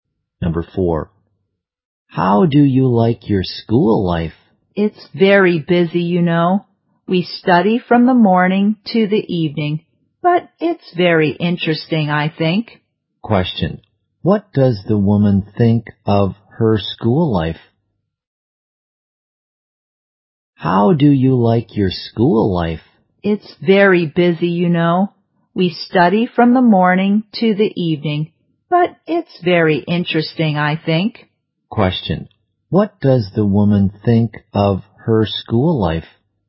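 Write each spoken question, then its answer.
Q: what does the woman think of her school life?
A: Busy but interesting.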